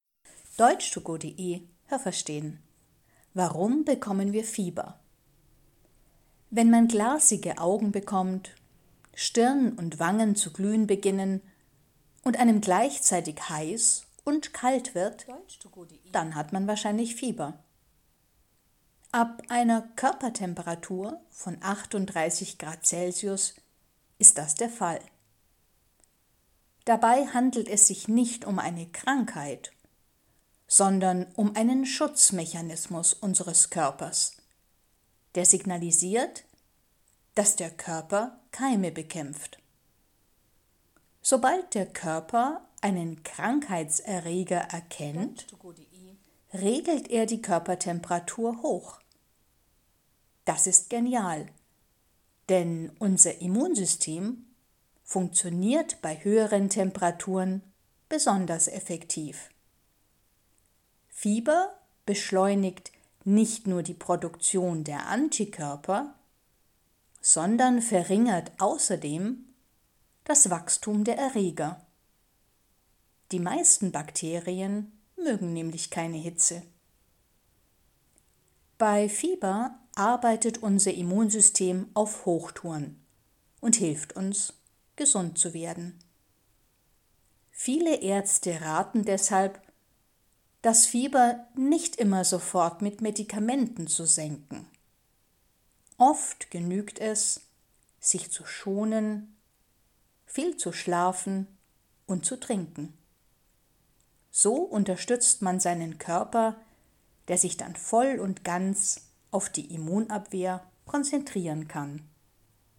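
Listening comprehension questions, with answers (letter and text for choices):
Es gibt nur eine korrekte Antwort.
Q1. Man hat wahrscheinlich Fieber, wenn Stirn und Wangen ...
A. heiß werden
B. weiß werden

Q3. Fieber ist ...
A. eine Krankheit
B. keine Krankheit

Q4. Wenn die Körpertemperatur hoch ist, ...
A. kann das Immunsystem besonders gut arbeiten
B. funktioniert das Immunsystem nicht mehr so effektiv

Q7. Man sollte Fieber _____ mit Medikamenten senken und sich schonen.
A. nicht immer sofort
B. immer sofort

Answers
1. A. heiß werden
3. B. keine Krankheit
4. A. kann das Immunsystem besonders gut arbeiten
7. A. nicht immer sofort

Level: B2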